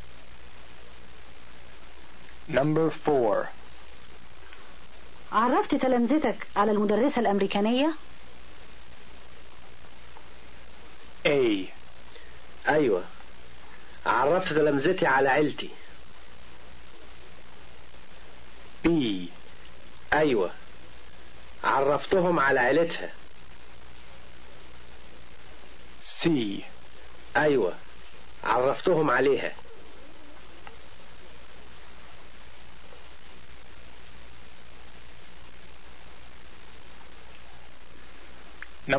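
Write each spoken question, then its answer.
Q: عرفت تلامذتك على المدرسة الأمريكانية؟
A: C: أيوة عرفتهم عليها.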